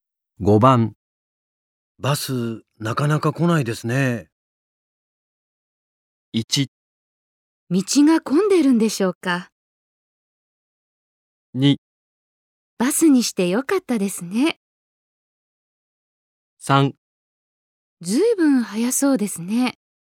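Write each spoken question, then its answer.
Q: バス、なかなか来ないですね。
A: 1: 道が混んでるんでしょうか。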